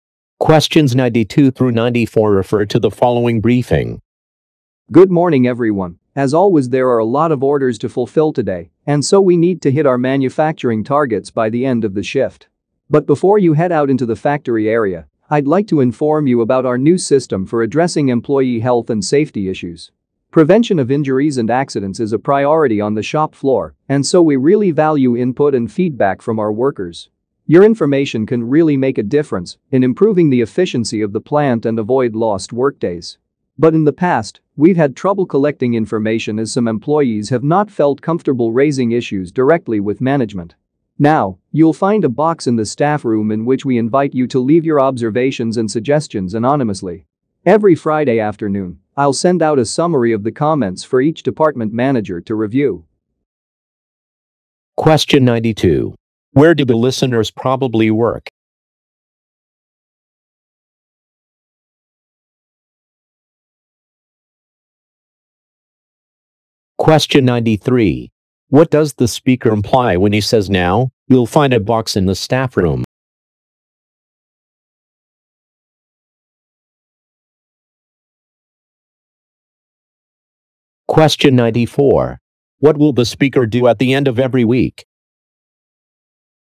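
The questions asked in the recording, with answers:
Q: Where do the listeners probably work?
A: In a factory

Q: What will the speaker do at the end of every week?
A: Send department managers a summary of the comments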